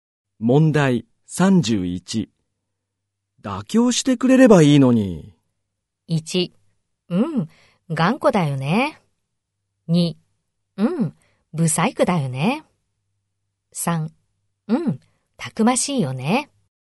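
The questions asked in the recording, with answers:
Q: 妥協してくれればいいのに。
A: 1: 頑固だよね。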